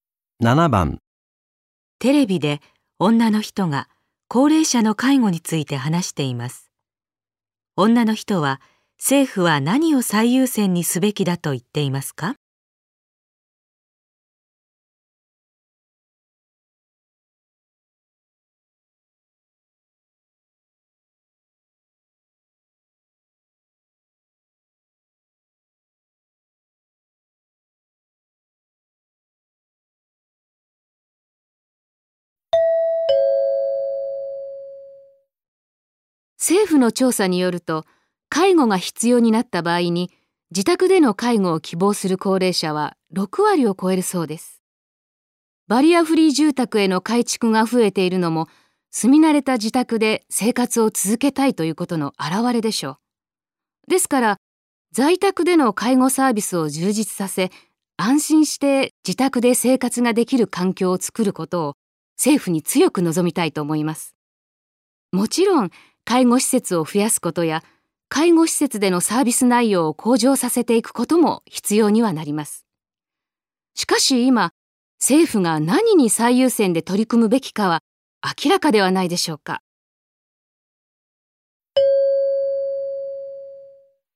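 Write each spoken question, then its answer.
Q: 女の人は、政府は何を最優先にすべきだと言っていますか?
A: 在宅での介護サービスを充実させること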